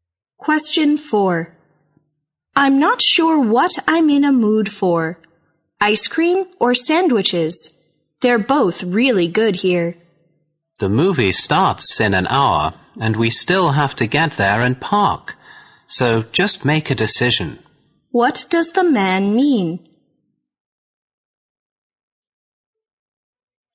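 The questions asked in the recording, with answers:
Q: What does the man mean?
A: She should decide quickly because they need time to get to the movie.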